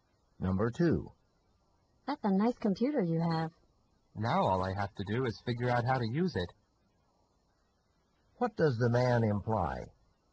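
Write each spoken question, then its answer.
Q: What does the man imply?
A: He doesn't know how to use the computer yet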